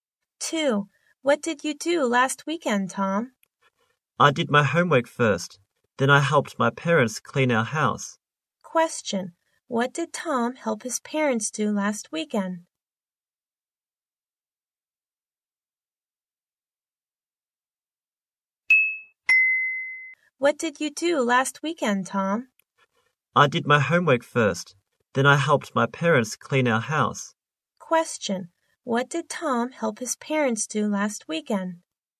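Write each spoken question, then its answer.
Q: What did Tom help his parents do last weekend?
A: Clean their house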